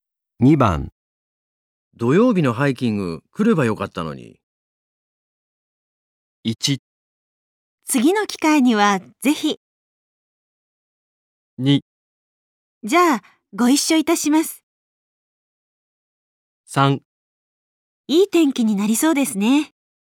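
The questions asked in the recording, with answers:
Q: 土曜日のハイキング来ればよかったのに。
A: 1: 次の機会にはぜひ。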